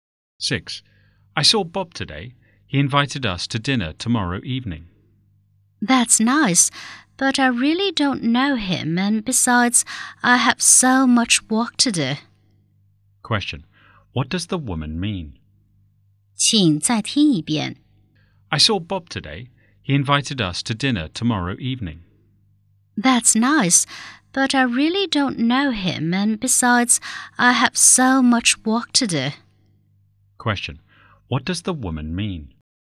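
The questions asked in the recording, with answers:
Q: What does the woman mean?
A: She doesn't want to go to dinner with Bob.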